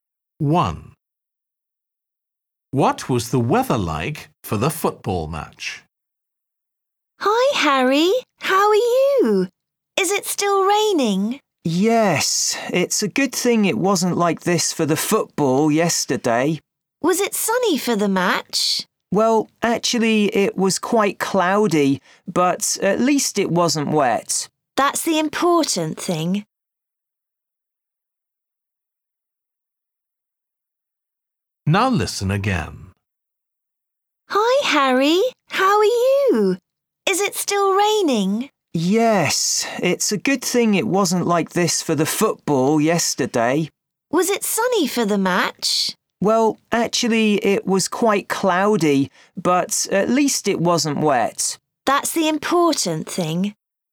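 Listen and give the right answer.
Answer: cloudy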